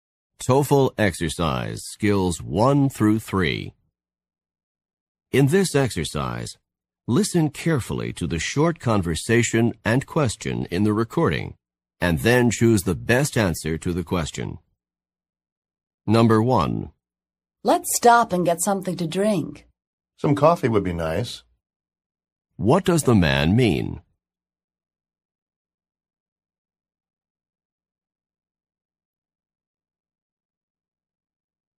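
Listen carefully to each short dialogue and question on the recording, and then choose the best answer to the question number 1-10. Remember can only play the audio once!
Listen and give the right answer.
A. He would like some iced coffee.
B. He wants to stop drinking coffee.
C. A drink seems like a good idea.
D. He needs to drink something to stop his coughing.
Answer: C. A drink seems like a good idea.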